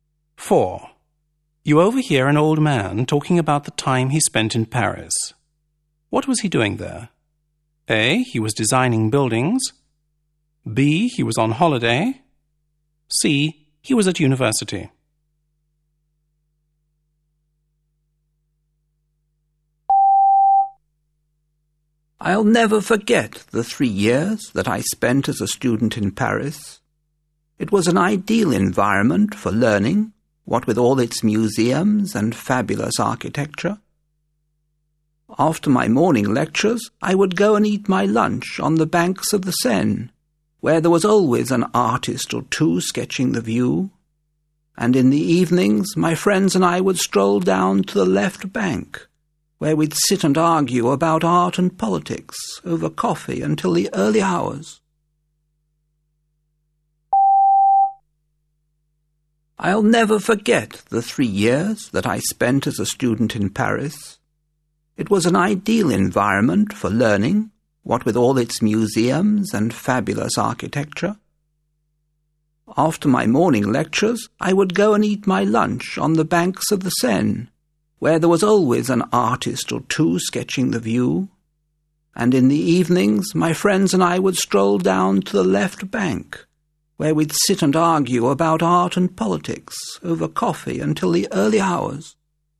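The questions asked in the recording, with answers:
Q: What was he doing there?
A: C: He was at university.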